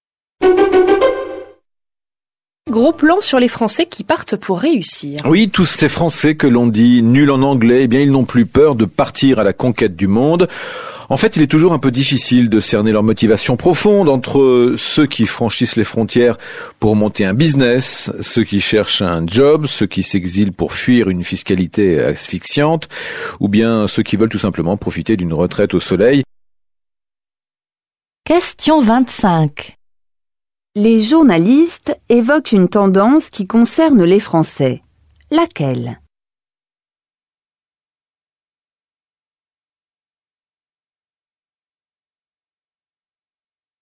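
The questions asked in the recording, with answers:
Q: Laquelle?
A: De plus en plus de Français partent à l'étranger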